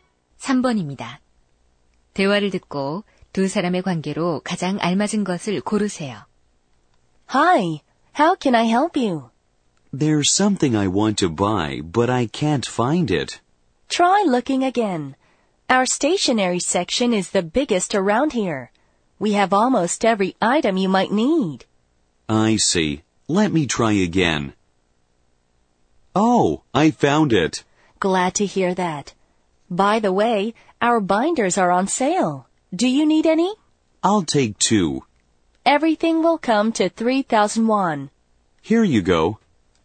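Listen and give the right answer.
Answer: 문구점 점원과 손님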